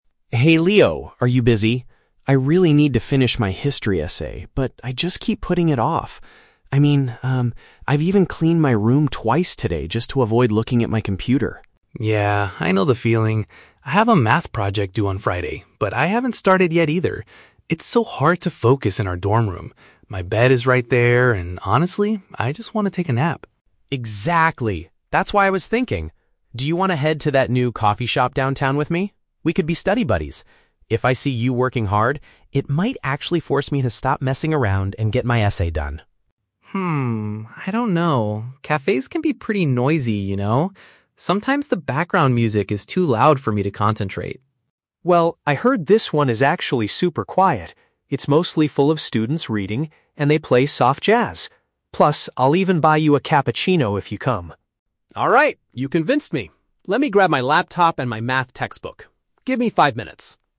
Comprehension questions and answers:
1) Why does Ben want to leave the dorm room?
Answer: He lacks the motivation to do his assignment there.

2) What is Leo's initial concern about going to the coffee shop?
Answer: The environment might be too distracting.

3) What makes Leo finally agree to go?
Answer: Ben promises a free drink at a peaceful place.

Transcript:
Ben: Hey Leo, are you busy? I really need to finish my history essay, but I just keep putting it off. I mean, um... I've even cleaned my room twice today just to avoid looking at my computer.
Leo: Yeah, I know the feeling. I have a math project due on Friday, but I haven't started yet either. It's so hard to focus in our dorm room. My bed is right there, and honestly, I just want to take a nap.
Ben: Exactly! That's why I was thinking... do you want to head to that new coffee shop downtown with me? We could be study buddies. If I see you working hard, it might actually force me to stop messing around and get my essay done.
Leo: Hmm, I don't know. Cafes can be pretty noisy, you know? Sometimes the background music is too loud for me to concentrate.
Ben: Well, I heard this one is actually super quiet. It's mostly full of students reading, and they play soft jazz. Plus, I'll even buy you a cappuccino if you come!
Leo: Alright, you convinced me! Let me grab my laptop and my math textbook. Give me five minutes.